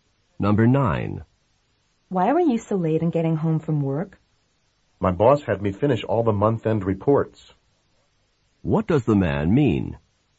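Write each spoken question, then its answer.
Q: What does the man mean?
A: He had to stay late to finish the month-end reports.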